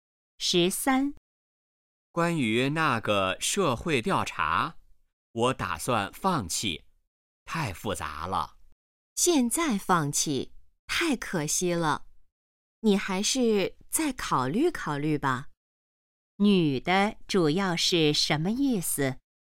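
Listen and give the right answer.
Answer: 劝男的别放弃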